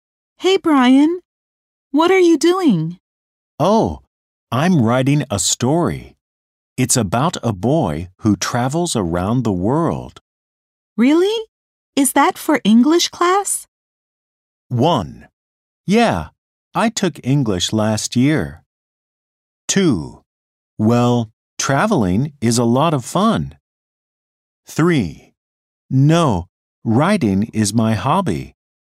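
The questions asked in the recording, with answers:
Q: Really? Is that for English class?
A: 3: No, writing is my hobby.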